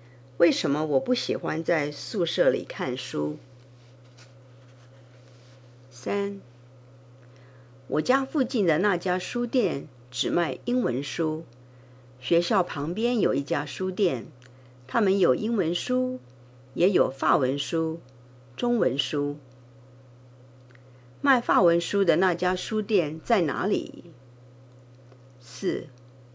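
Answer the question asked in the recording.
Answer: 在学校旁边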